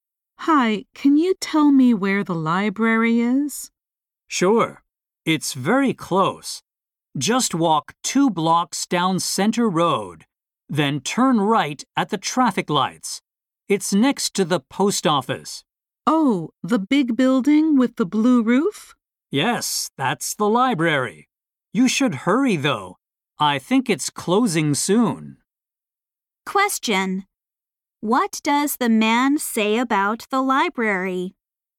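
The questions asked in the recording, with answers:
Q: What does the man say about the library?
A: It is closing soon.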